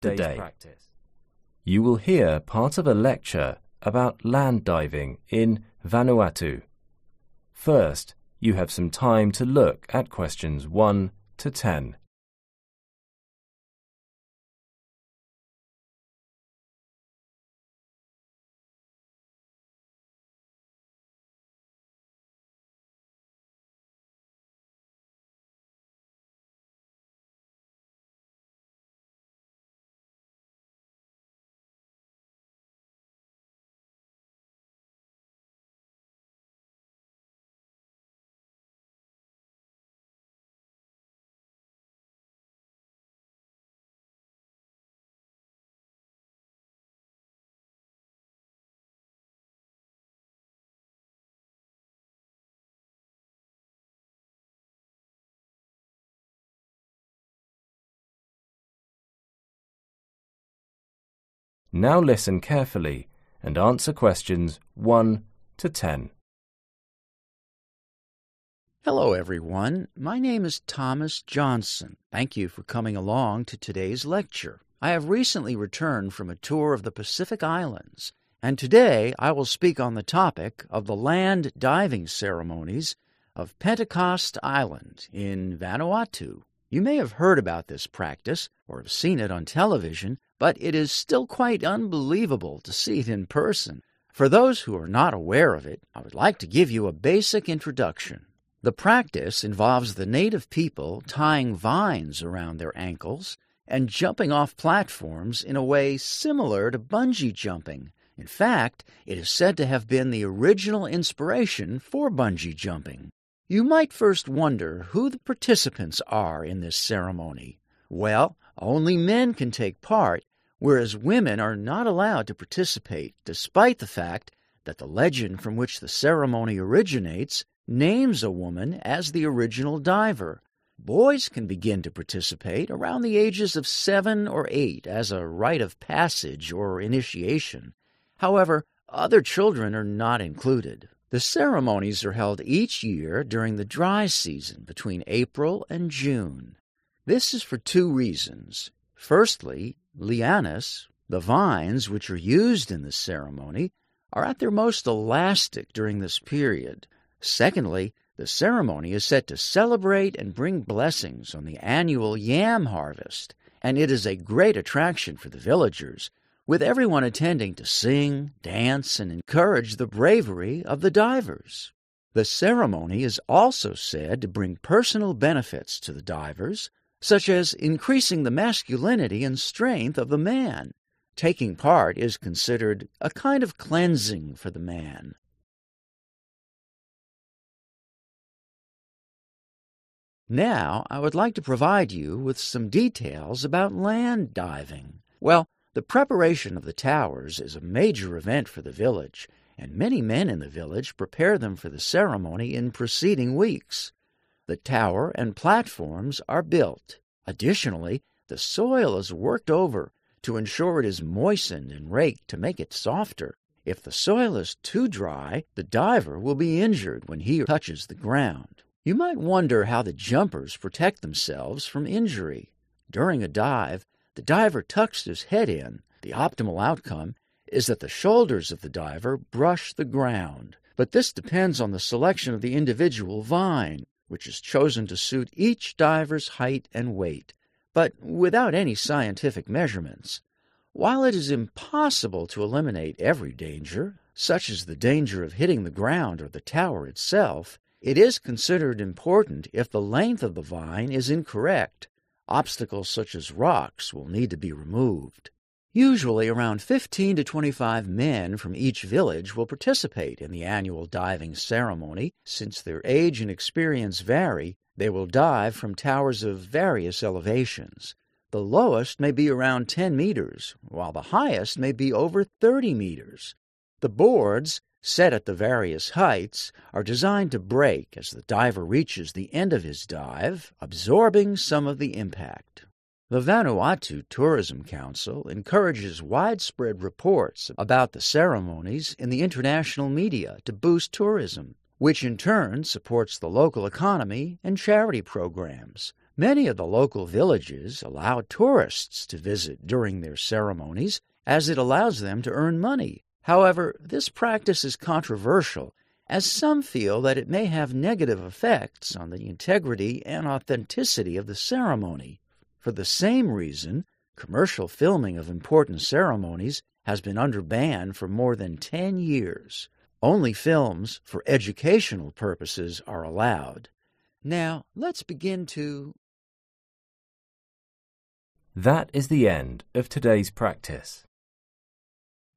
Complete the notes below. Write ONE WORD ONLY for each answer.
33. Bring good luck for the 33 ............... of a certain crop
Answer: harvest

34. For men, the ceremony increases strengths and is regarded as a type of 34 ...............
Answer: cleansing

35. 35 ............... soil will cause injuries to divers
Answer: dry

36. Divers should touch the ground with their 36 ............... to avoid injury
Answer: shoulders

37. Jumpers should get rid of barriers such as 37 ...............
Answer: rocks

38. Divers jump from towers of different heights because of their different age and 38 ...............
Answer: experience

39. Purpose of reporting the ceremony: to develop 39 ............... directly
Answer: tourism

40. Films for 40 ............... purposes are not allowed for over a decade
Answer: commercial